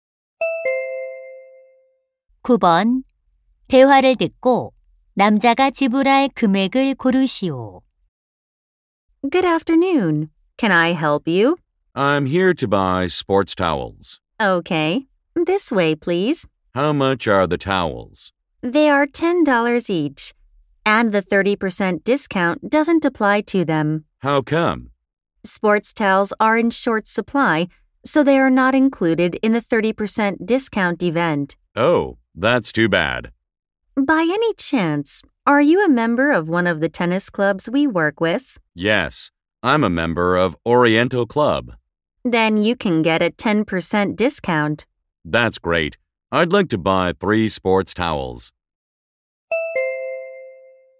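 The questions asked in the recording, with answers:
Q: 대화를 듣고 남자가 지불할 금액을 고르시오.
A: $27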